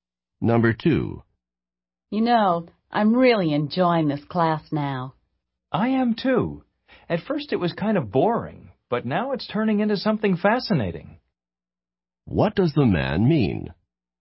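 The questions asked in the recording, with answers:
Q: What does the man mean?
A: He is enjoying the class now too; it has become fascinating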